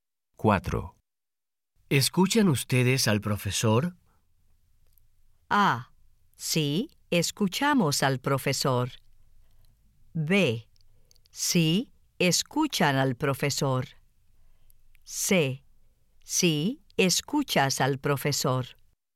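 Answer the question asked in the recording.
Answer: A: Sí, escuchamos al profesor.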